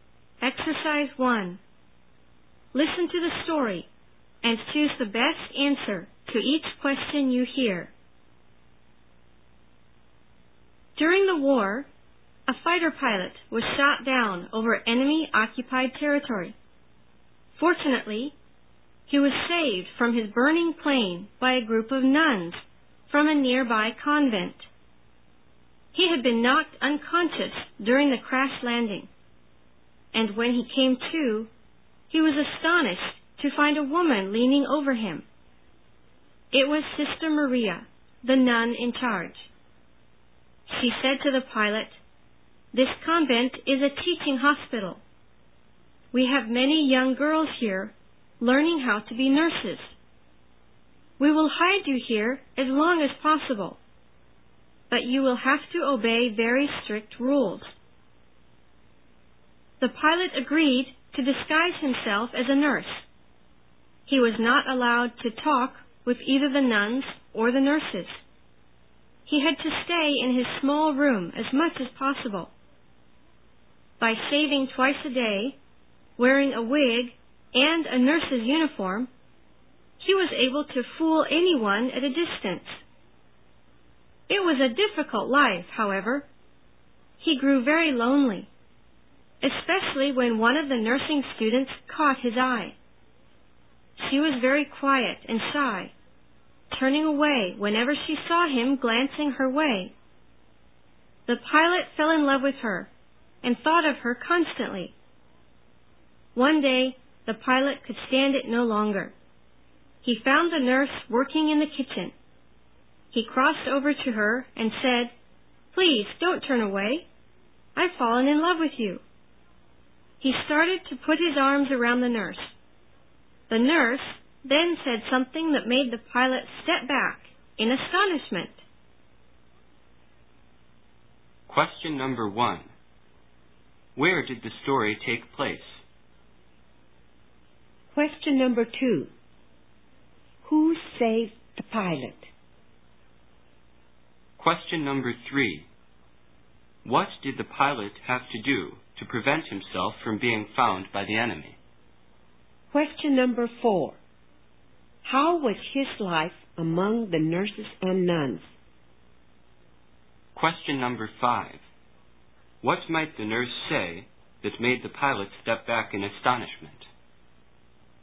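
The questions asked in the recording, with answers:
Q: Where did the story take place?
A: In a convent (a teaching hospital) in enemy-occupied territory

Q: Who saved the pilot?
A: A group of nuns from a nearby convent

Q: What did the pilot have to do to prevent himself from being found by the enemy?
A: Disguise himself as a nurse

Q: How was his life among the nurses and nuns?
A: Difficult and lonely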